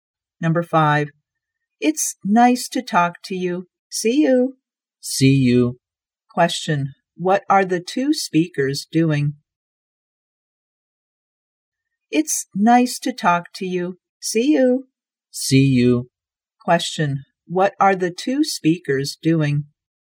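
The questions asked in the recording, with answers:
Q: what are the two speakers doing?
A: Saying goodbye.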